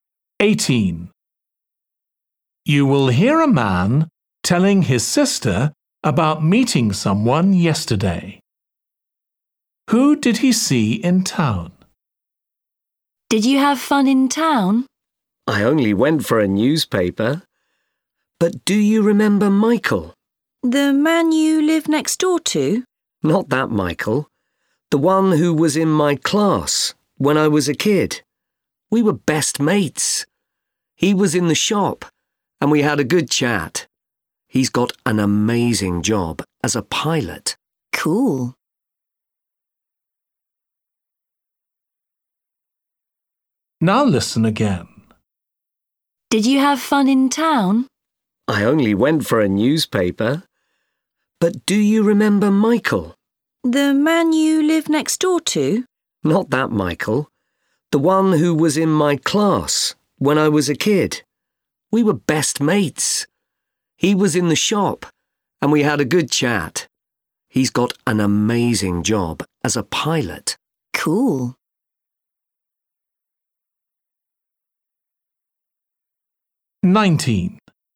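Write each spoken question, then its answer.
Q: Who did he see in town?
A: an old school friend (now a pilot)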